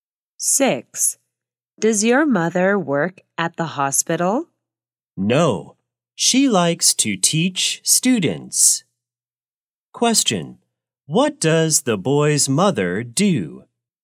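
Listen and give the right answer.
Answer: She is a teacher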